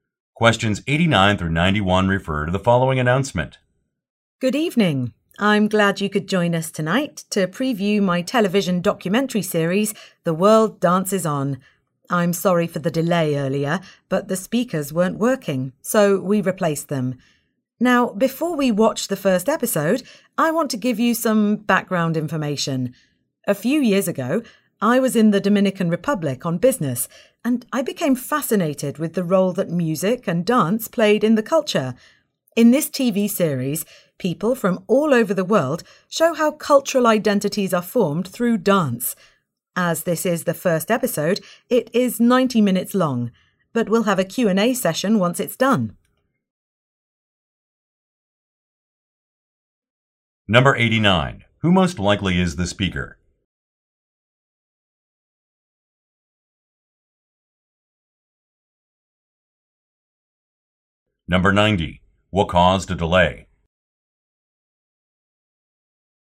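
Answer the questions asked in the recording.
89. A documentary filmmaker
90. The speakers weren't working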